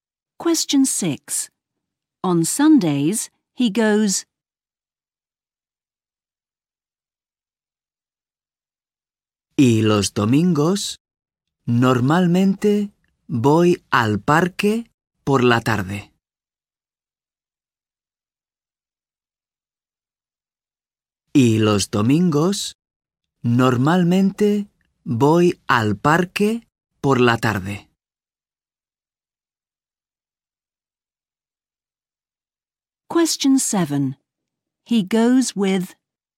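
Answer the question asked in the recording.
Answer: to the park in the afternoon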